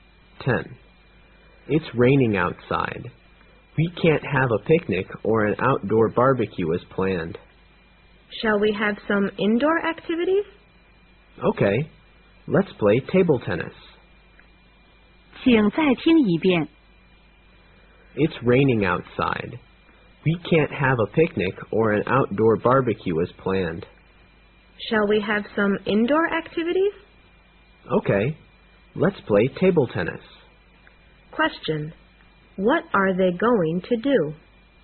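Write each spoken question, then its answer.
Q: What are they going to do?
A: Play table tennis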